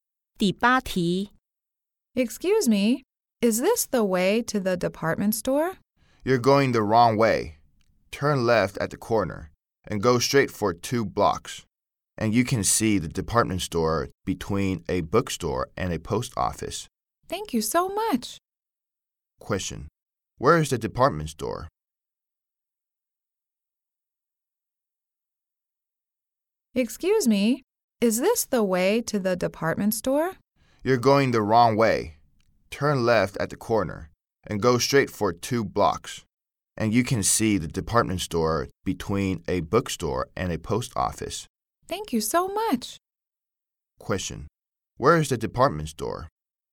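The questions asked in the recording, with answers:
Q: Where is the department store?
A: Between a bookstore and a post office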